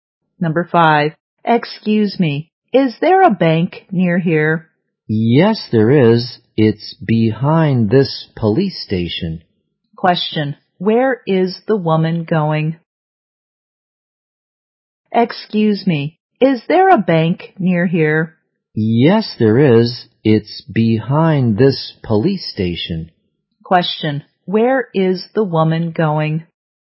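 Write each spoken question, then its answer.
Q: where is the woman going?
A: To the bank.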